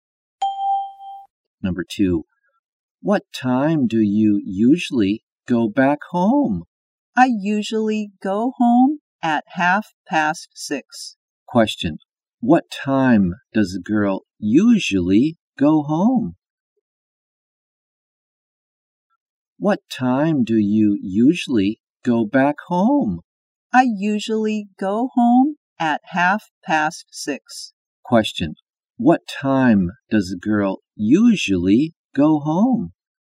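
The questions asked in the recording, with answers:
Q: What time does a girl usually go home?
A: At 6:30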